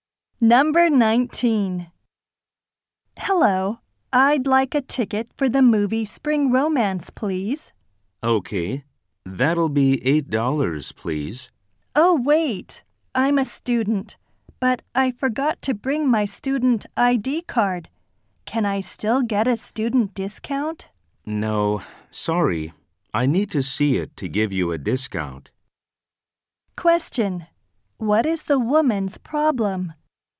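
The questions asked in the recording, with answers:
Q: What is the woman's problem?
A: She forgot her student ID, so she can't get a student discount.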